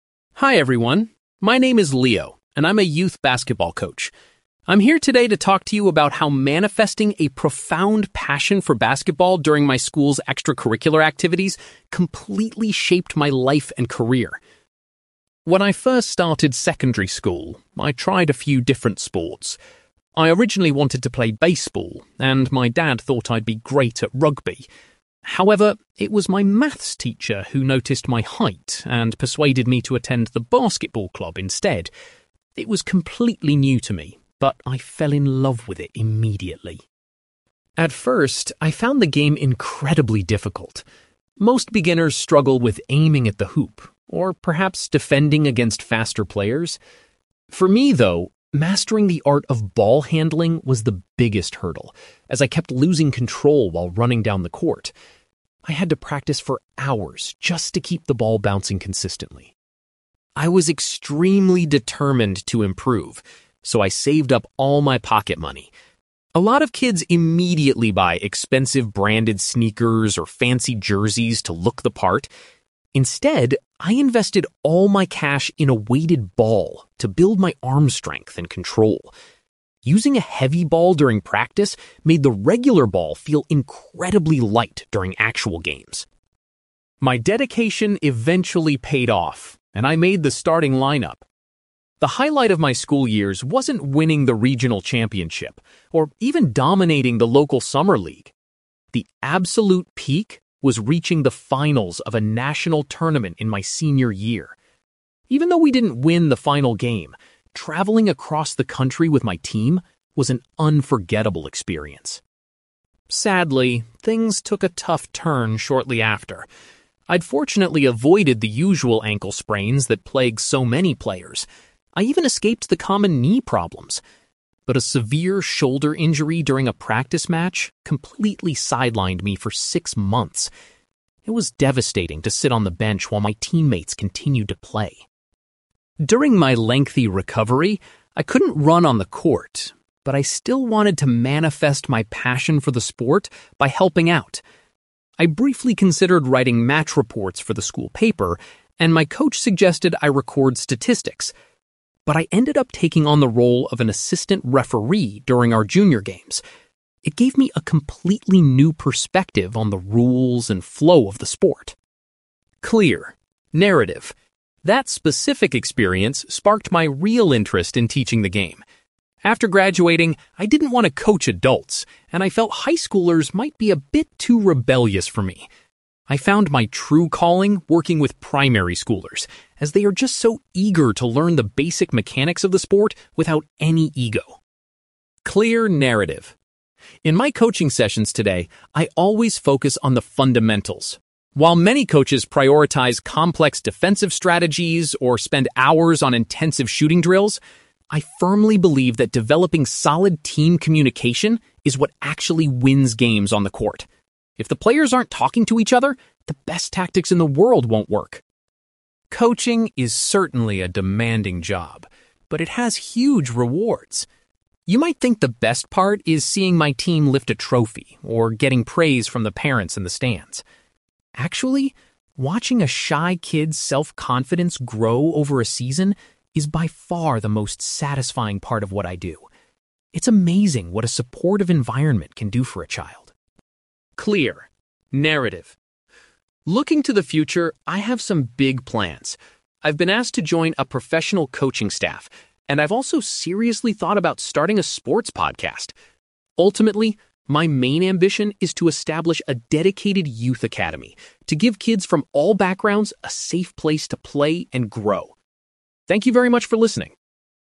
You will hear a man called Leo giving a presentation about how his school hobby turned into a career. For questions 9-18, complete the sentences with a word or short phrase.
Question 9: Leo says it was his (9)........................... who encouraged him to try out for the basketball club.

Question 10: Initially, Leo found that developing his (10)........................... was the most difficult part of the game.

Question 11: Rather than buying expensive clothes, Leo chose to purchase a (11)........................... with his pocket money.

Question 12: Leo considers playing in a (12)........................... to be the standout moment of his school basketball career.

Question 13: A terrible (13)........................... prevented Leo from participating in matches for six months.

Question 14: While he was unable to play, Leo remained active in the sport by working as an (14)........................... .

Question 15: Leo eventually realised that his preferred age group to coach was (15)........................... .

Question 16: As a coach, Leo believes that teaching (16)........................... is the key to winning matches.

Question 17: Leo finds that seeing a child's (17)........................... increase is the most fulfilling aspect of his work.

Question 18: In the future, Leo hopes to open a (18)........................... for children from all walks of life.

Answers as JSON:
{"9": "maths teacher", "10": "ball handling", "11": "weighted ball", "12": "national tournament", "13": "shoulder injury", "14": "assistant referee", "15": "primary schoolers", "16": "team communication", "17": "self-confidence", "18": "youth academy"}

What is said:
Leo: Hi everyone, my name is Leo, and I'm a youth basketball coach. I'm here today to talk to you about how manifesting a profound passion for basketball during my school's extracurricular activities completely shaped my life and career.
When I first started secondary school, I tried a few different sports. I originally wanted to play baseball, and my dad thought I'd be great at rugby. However, it was my maths teacher who noticed my height and persuaded me to attend the basketball club instead. It was completely new to me, but I fell in love with it immediately.
At first, I found the game incredibly difficult. Most beginners struggle with aiming at the hoop, or perhaps defending against faster players. For me, though, mastering the art of ball handling was the biggest hurdle, as I kept losing control while running down the court. I had to practice for hours just to keep the ball bouncing consistently.
I was extremely determined to improve, so I saved up all my pocket money. A lot of kids immediately buy expensive branded sneakers or fancy jerseys to look the part. Instead, I invested all my cash in a weighted ball to build my arm strength and control. Using a heavy ball during practice made the regular ball feel incredibly light during actual games.
My dedication eventually paid off, and I made the starting lineup. The highlight of my school years wasn't winning the regional championship, or even dominating the local summer league. The absolute peak was reaching the finals of a national tournament in my senior year. Even though we didn't win the final game, traveling across the country with my team was an unforgettable experience.
Sadly, things took a tough turn shortly after. I'd fortunately avoided the usual ankle sprains that plague so many players. I even escaped the common knee problems. But a severe shoulder injury during a practice match completely sidelined me for six months. It was devastating to sit on the bench while my teammates continued to play.
During my lengthy recovery, I couldn't run on the court, but I still wanted to manifest my passion for the sport by helping out. I briefly considered writing match reports for the school paper, and my coach suggested I record statistics. But I ended up taking on the role of an assistant referee during our junior games. It gave me a completely new perspective on the rules and flow of the sport.
That specific experience sparked my real interest in teaching the game. After graduating, I didn't want to coach adults, and I felt high schoolers might be a bit too rebellious for me. I found my true calling working with primary schoolers, as they are just so eager to learn the basic mechanics of the sport without any ego.
In my coaching sessions today, I always focus on the fundamentals. While many coaches prioritize complex defensive strategies, or spend hours on intensive shooting drills, I firmly believe that developing solid team communication is what actually wins games on the court. If the players aren't talking to each other, the best tactics in the world won't work.
Coaching is certainly a demanding job, but it has huge rewards. You might think the best part is seeing my team lift a trophy, or getting praise from the parents in the stands. Actually, watching a shy kid's self-confidence grow over a season is by far the most satisfying part of what I do. It's amazing what a supportive environment can do for a child.
Looking to the future, I have some big plans. I've been asked to join a professional coaching staff, and I've also seriously thought about starting a sports podcast. Ultimately, my main ambition is to establish a dedicated youth academy to give kids from all backgrounds a safe place to play and grow. Thank you very much for listening!

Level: B2